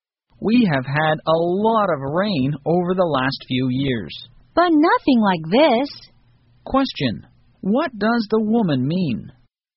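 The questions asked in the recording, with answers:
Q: Question, what does the woman mean?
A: This rain is much heavier than any in recent years.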